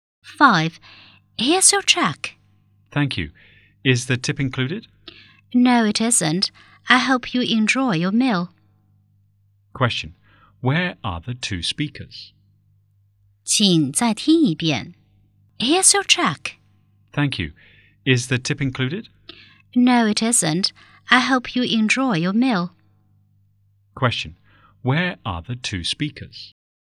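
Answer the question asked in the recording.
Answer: In a restaurant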